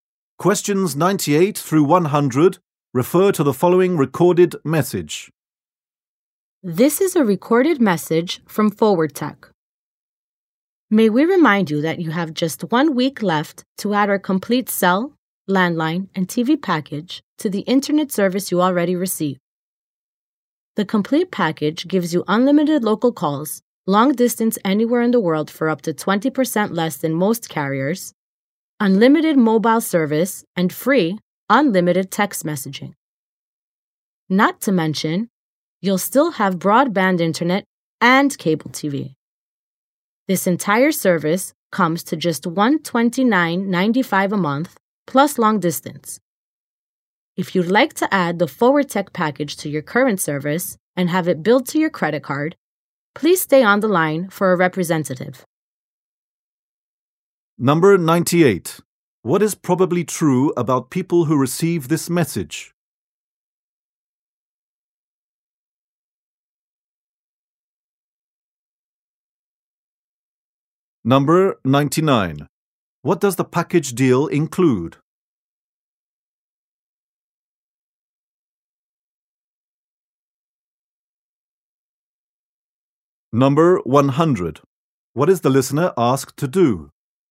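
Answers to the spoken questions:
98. They already get Forward Tech internet service.
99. Cell, landline and TV service (unlimited local calls, mobile service and texting)
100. Stay on the line for a representative.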